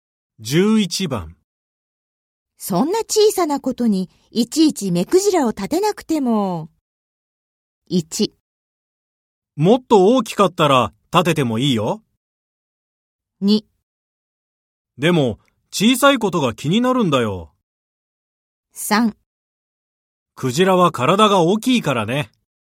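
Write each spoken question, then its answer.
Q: そんな小さなことにいちいち目くじらを立てなくても。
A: 2: でも小さいことが気になるんだよ。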